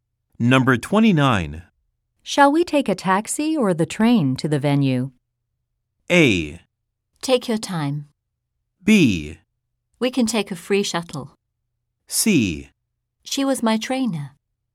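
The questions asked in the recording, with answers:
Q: Shall we take a taxi or the train to the venue?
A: B: We can take a free shuttle.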